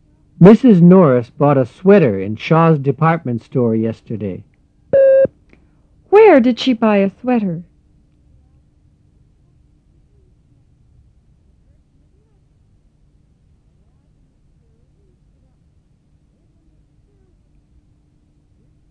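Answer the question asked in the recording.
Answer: In Shaw's department store.

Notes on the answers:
Mrs. Norris bought a sweater in Shaw's Department Store yesterday.

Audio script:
Mrs. Norris bought a sweater in Shaw's Department Store yesterday. Where did she buy a sweater?

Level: 入门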